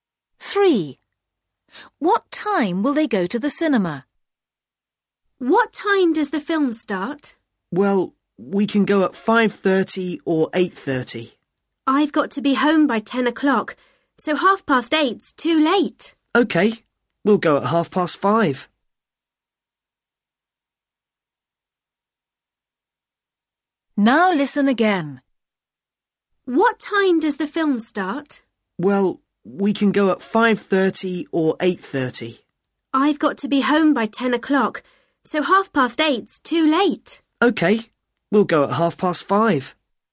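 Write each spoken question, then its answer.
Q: What time will they go to the cinema?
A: 5:30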